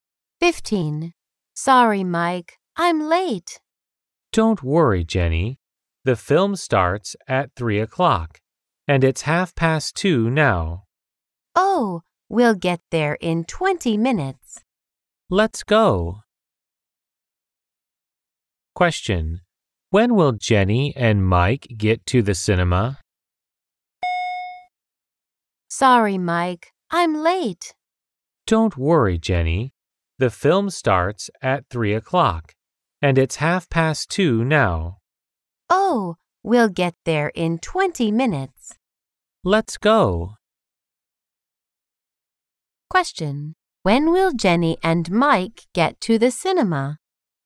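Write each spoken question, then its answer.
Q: When will Jenny and Mike get to the cinema?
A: At 2:50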